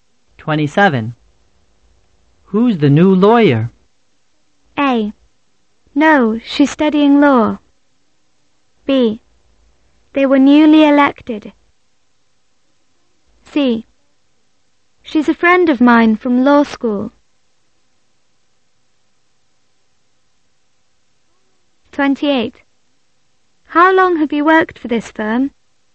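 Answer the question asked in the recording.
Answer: C: She's a friend of mine from law school.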